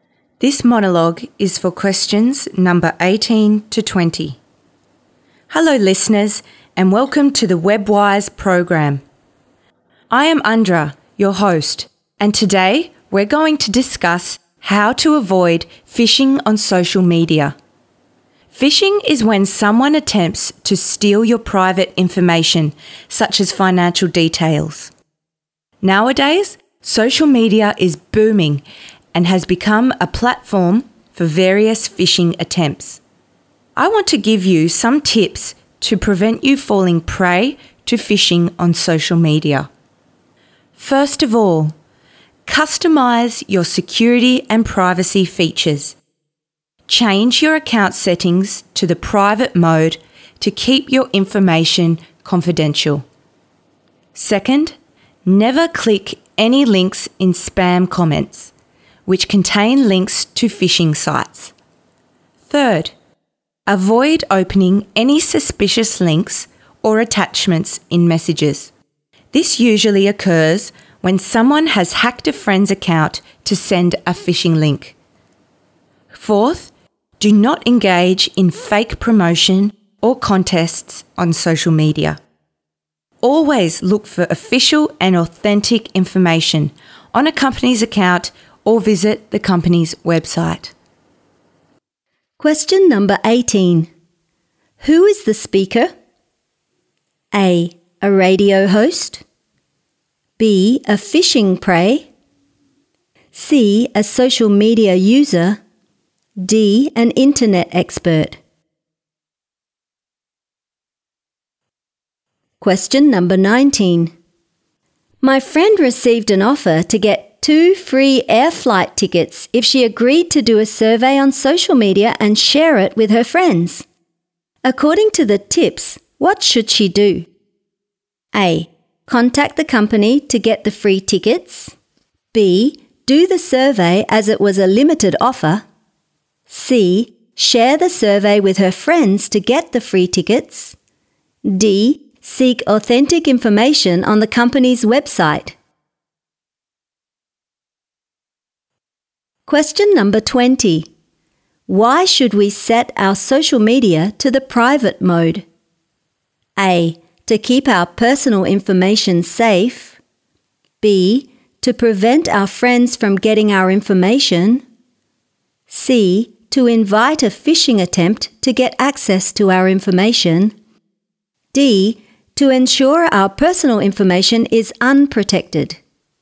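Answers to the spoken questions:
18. A: A radio host.
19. D: Seek authentic information on the company's website.
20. A: To keep our personal information safe.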